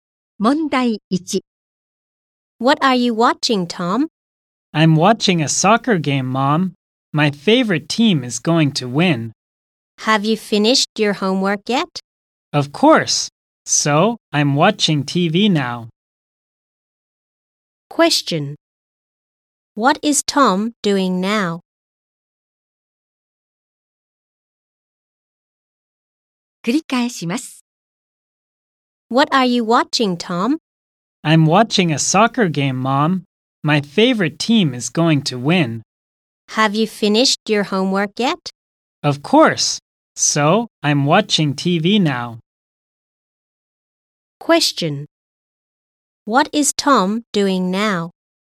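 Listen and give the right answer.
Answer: He is watching a soccer game on TV.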